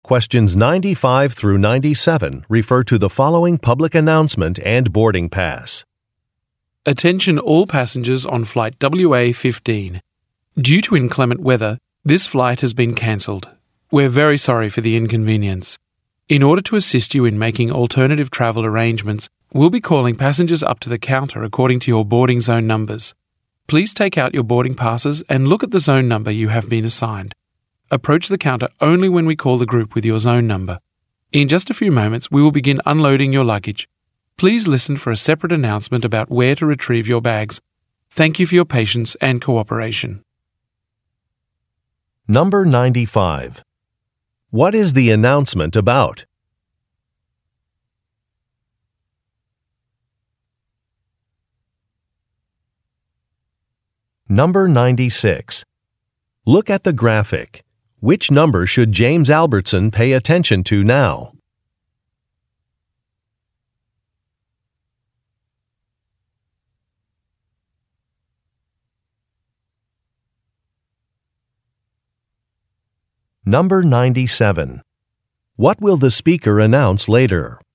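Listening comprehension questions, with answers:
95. What is the announcement about?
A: A flight cancellation

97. What speaker will announce later?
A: Where to find luggage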